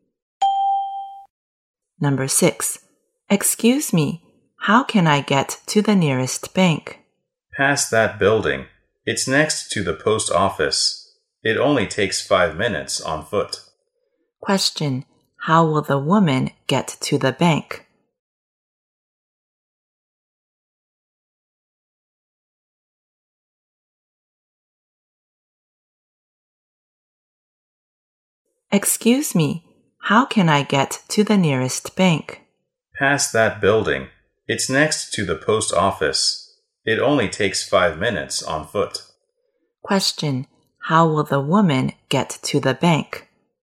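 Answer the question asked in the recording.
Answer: On foot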